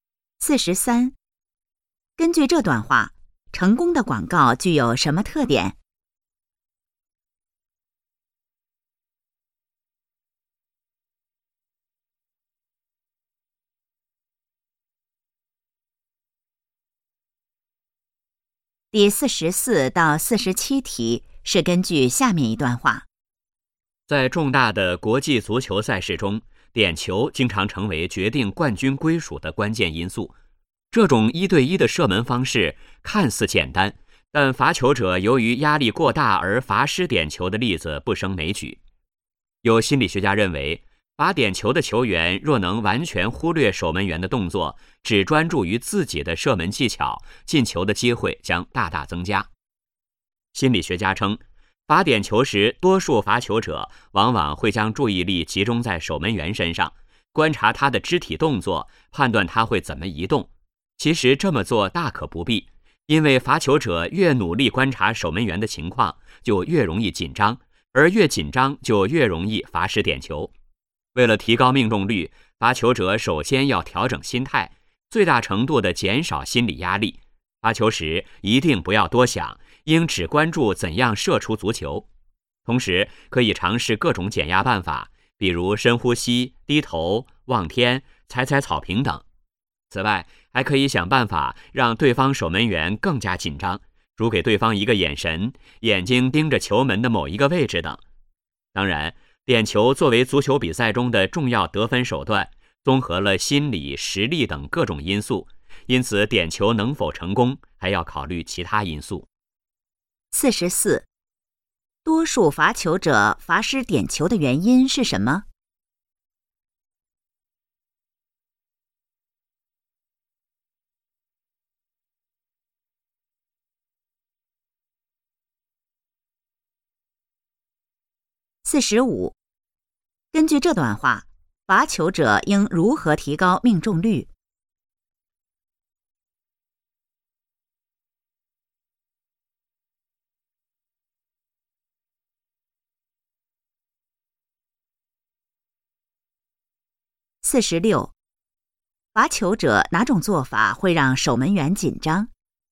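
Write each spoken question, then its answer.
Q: 多数罚球者罚失点球的原因是什么?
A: 把注意力集中在守门员身上,越来越紧张

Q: 根据这段话,罚球者应如何提高命中率?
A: 调整心态,减少心理压力

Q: 罚球者哪种做法会让守门员紧张?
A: 给对方一个眼神,盯着球门某个位置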